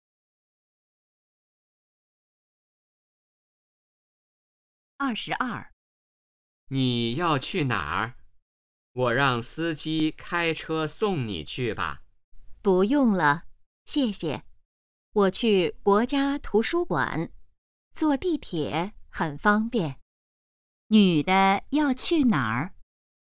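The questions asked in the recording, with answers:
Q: 女的要去哪儿?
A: 国家图书馆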